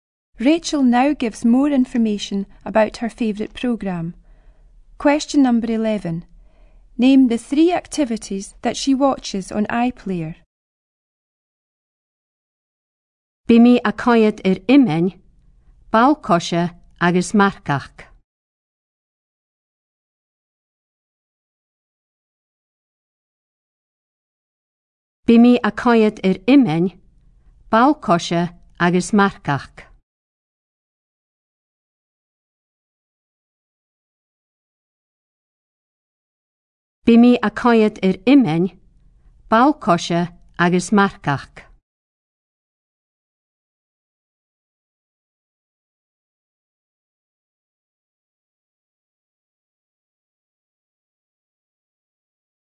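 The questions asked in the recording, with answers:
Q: Name the three activities that she watches on iPlayer.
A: Shinty, football and horse riding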